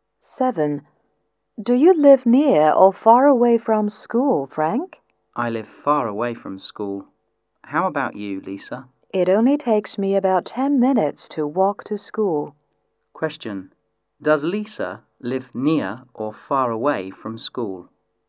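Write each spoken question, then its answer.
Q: Does Lisa live near or far away from school?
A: Near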